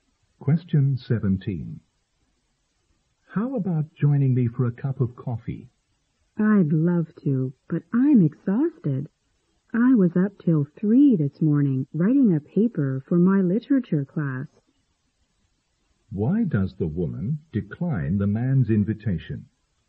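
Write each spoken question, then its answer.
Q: Why does the woman decline the man's invitation?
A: She is exhausted after staying up until 3 a.m. writing a paper.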